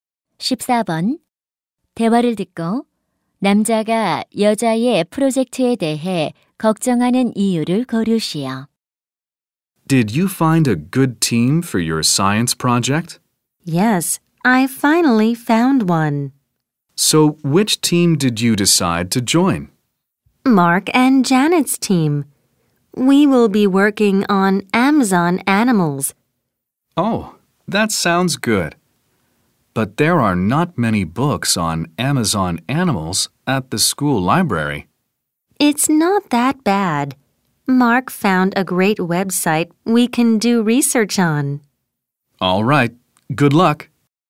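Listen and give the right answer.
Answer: 학교 도서관에 아마존 동물에 관한 책이 많지 않아서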